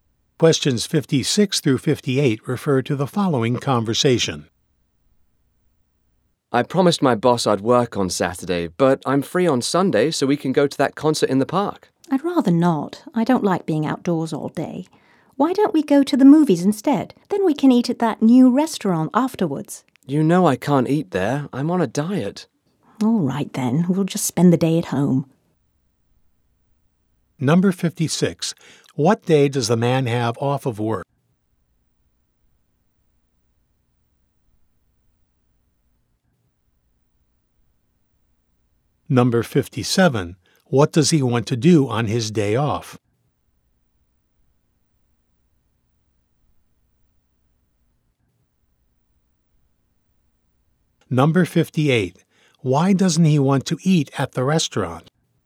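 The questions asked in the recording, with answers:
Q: What day does the man have off of work?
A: Sunday

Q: Why doesn't he want to eat at the restaurant?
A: He is on a diet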